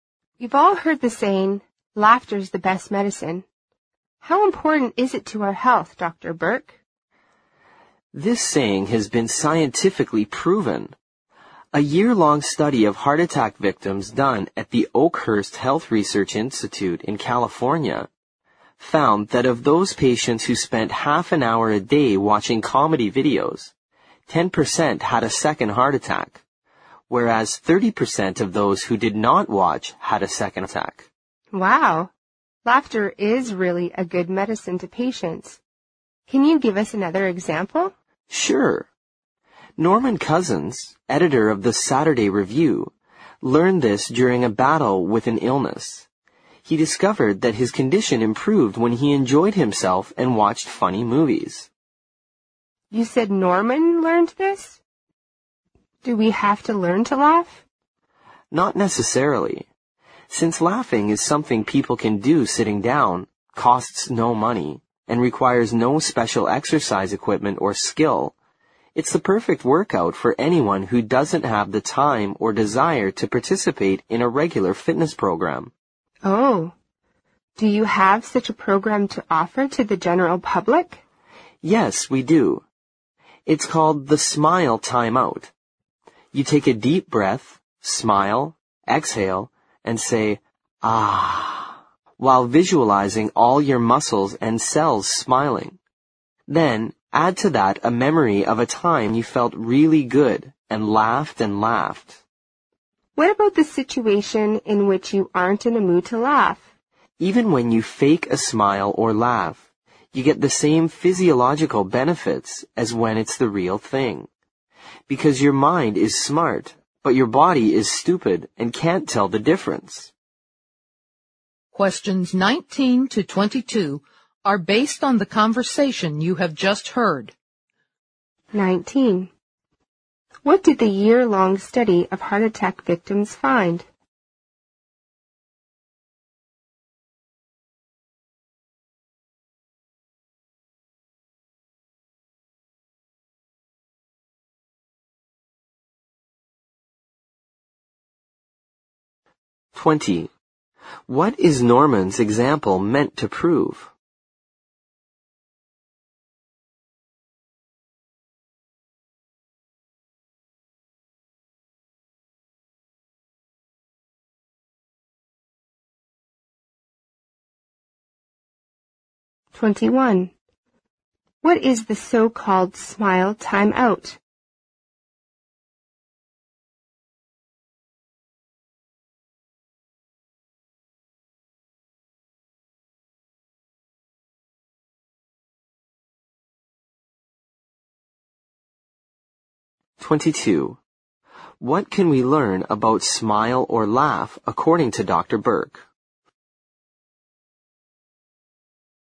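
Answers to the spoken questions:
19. Patients who watched comedy videos half an hour a day had fewer second heart attacks (10% vs 30%).
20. That laughter is good medicine; his illness improved when he enjoyed himself and watched funny movies.
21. A laughing exercise program: breathe deeply, smile, exhale saying ah, and recall a time you laughed.
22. Even a fake smile or laugh gives the same physiological benefits as a real one.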